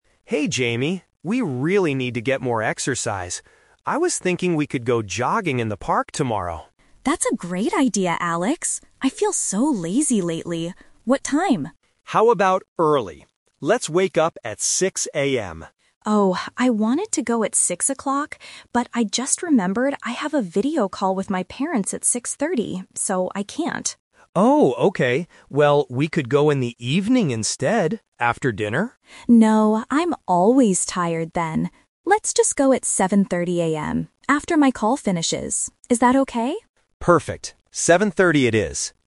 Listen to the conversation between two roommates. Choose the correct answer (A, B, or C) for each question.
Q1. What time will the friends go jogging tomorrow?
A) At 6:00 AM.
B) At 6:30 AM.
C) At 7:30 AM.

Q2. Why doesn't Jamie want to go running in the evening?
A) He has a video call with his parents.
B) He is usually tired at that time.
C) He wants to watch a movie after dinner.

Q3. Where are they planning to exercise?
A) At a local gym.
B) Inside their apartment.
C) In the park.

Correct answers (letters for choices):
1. C
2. B
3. C

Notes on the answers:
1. They finally agree to go at 7:30 AM. Option (A) is a trap; 6:00 AM was Alex's first idea, but Jamie rejected it because of his schedule. Option (B) is also a trap; 6:30 AM is the time Jamie has a video call, not the time they run.
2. When Alex suggests going in the evening after dinner, Jamie refuses and says, "No, I'm always tired then." Option (A) is a trap; the video call is his excuse for the morning, not the evening. Option (C) is plausible for an evening activity but was never mentioned in the audio.
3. At the beginning of the conversation, Alex clearly suggests, "we could go jogging in the park." Option (A) and (B) are plausible places to exercise but are not mentioned in the dialogue.

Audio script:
Alex: Hey Jamie, we really need to get more exercise. I was thinking we could go jogging in the park tomorrow.
Jamie: That's a great idea, Alex. I feel so lazy lately. What time?
Alex: How about early? Let's wake up at 6:00 AM.
Jamie: Oh, I wanted to go at 6:00, but I just remembered I have a video call with my parents at 6:30. So I can't.
Alex: Oh, okay. Well, we could go in the evening instead, after dinner?
Jamie: No, I'm always tired then. Let's just go at 7:30 AM, after my call finishes. Is that okay?
Alex: Perfect. 7:30 it is.